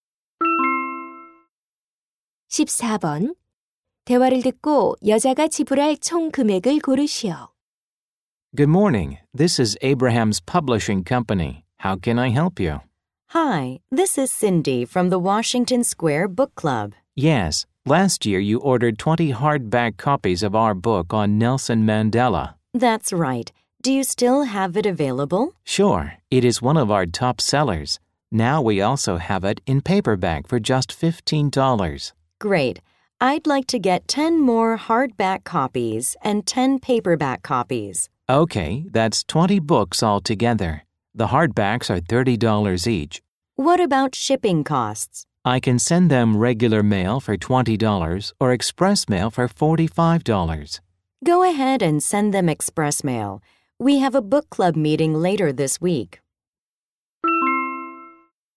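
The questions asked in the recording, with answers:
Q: 대화를 듣고 여자가 지불할 총 금액을 고르시오.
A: 495달러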